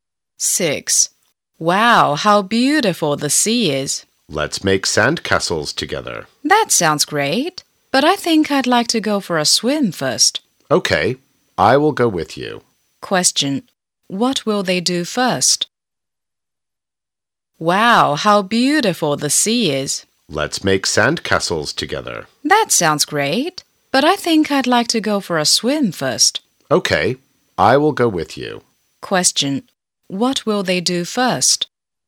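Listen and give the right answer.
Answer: Go for a swim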